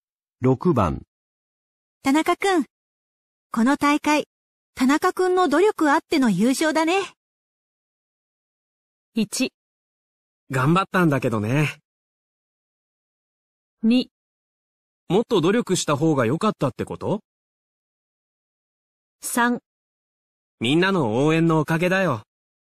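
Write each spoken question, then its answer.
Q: 田中くん、この大会、田中くんの努力あっての優勝だね。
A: 3: みんなの応援のおかげだよ。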